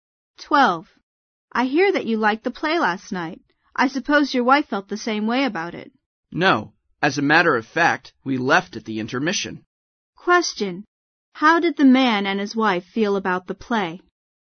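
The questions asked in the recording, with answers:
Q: How did the man and his wife feel about the play?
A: They didn't like it; they left at the intermission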